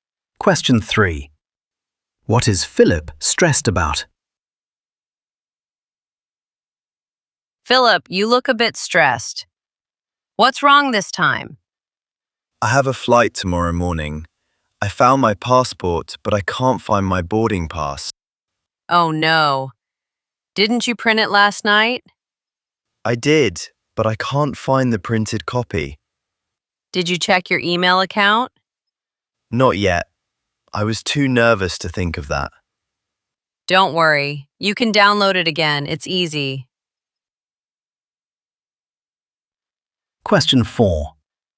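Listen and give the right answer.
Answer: he can't find his boarding pass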